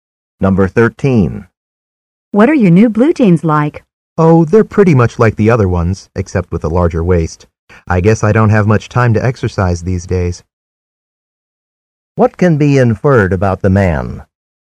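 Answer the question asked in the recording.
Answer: He has gained weight.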